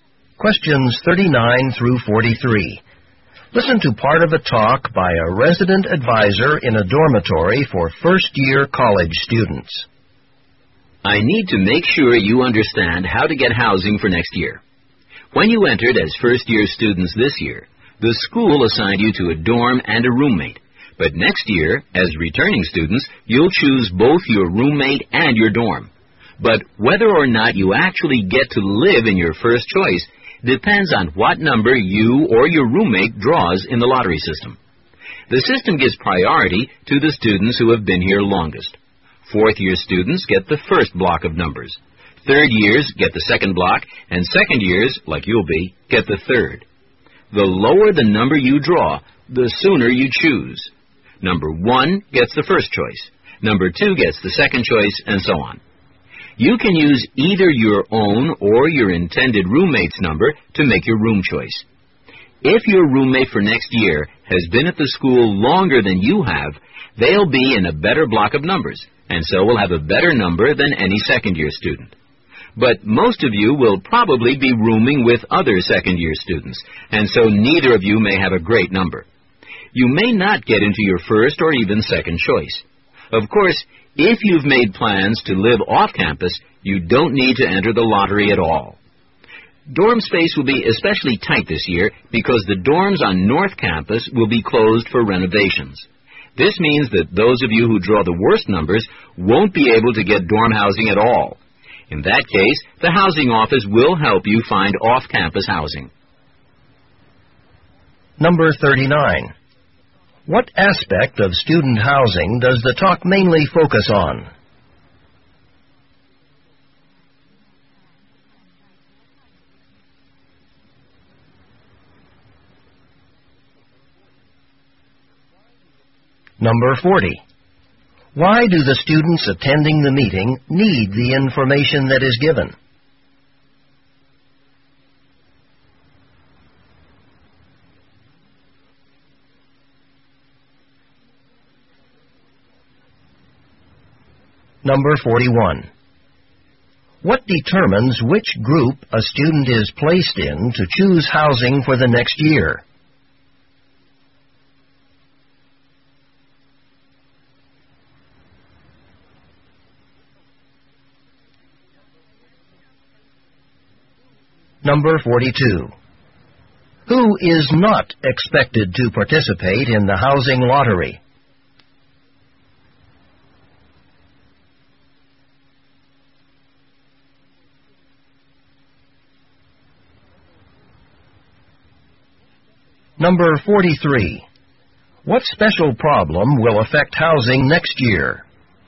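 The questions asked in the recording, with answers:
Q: What aspect of student housing does the talk mainly focus on?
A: How the lottery system for choosing dorm rooms works

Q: Why do the students attending the meeting need the information that is given?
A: They must choose their own housing for next year as returning students

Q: What determines which group a student is placed in to choose housing for the next year?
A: How long the student has been at the school

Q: Who is not expected to participate in the housing lottery?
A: Students who plan to live off campus

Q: What special problem will affect housing next year?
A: The North Campus dorms will be closed for renovations, so dorm space will be tight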